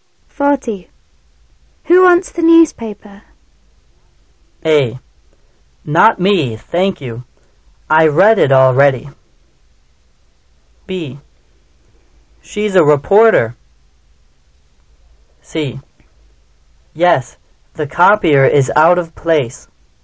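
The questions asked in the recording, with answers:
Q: Who wants the newspaper?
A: A: Not me, thank you. I read it already.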